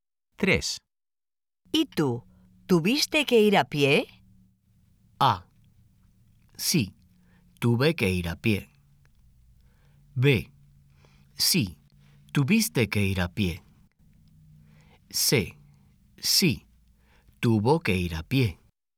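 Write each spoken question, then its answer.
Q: ¿Y tú? ¿Tuviste que ir a pie?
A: A: Sí, tuve que ir a pie.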